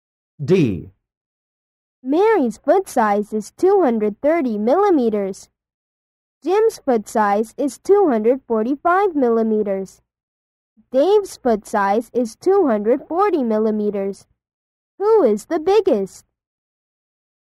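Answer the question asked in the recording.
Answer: Jim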